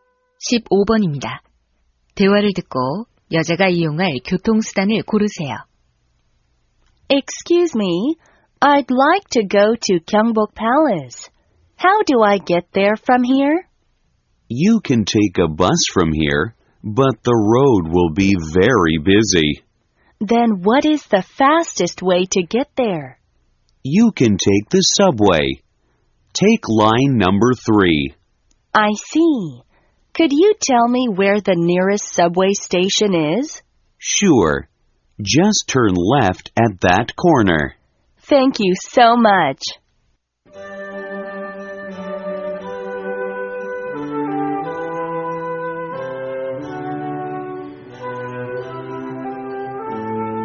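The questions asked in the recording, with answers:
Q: 대화를 듣고 여자가 이용할 교통수단을 고르세요.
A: 지하철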